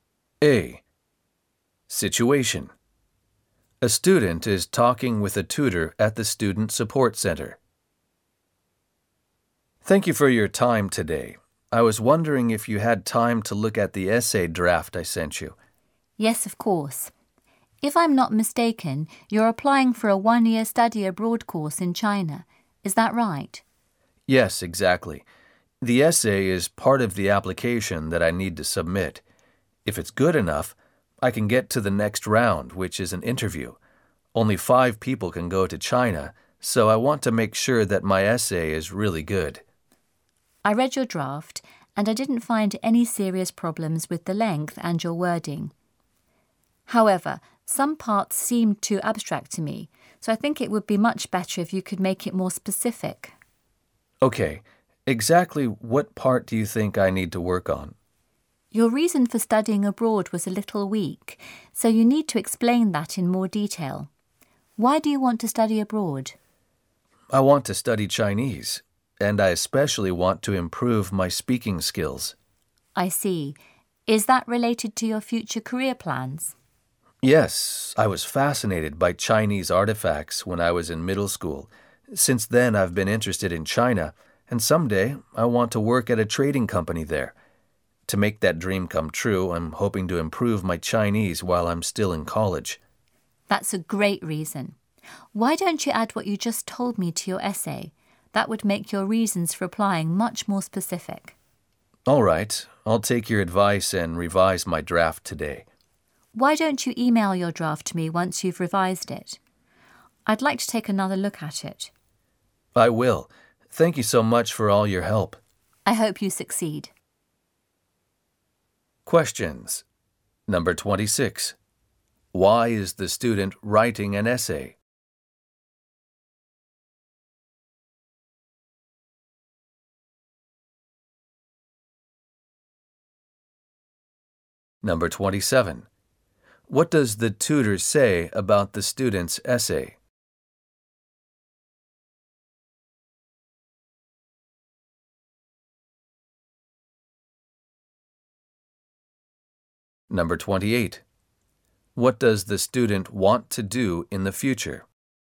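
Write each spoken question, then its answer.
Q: Why is the student writing an essay?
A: To apply for a one-year study abroad course in China

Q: What does the tutor say about the student's essay?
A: Some parts are too abstract; it should be more specific

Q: What does the student want to do in the future?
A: Work at a trading company in China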